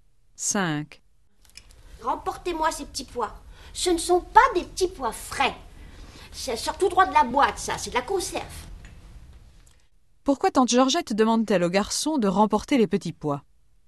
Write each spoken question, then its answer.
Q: Pourquoi tante Georgette demande-t-elle au garçon de remporter les petits pois?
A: Parce que ce ne sont pas des petits pois frais.